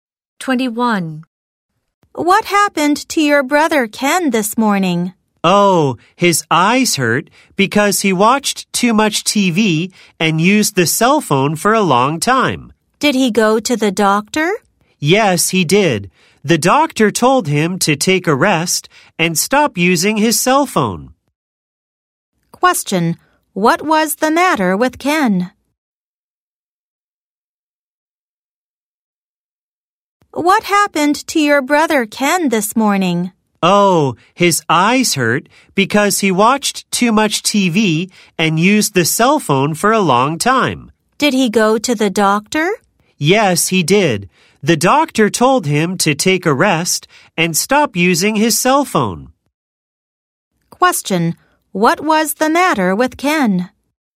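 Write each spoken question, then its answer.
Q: What was the matter with Ken?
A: His eyes hurt.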